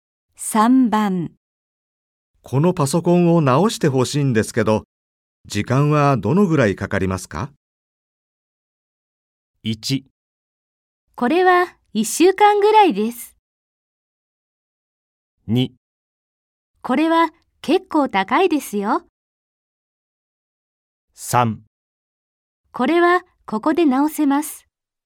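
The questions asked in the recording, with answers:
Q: このパソコンを直してほしいんですけど、時間はどのぐらいかかりますか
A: 1: これは1週間ぐらいです。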